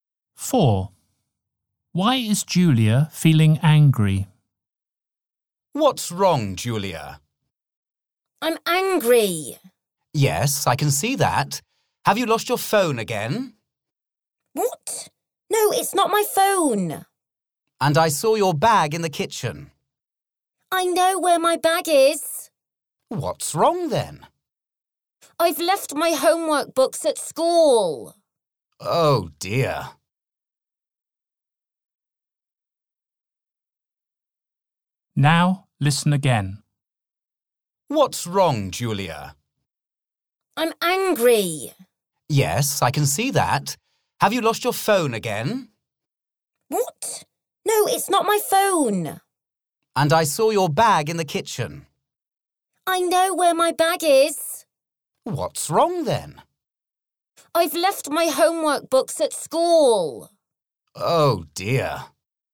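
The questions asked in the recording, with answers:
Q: Why is Julia feeling angry?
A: She left her homework books at school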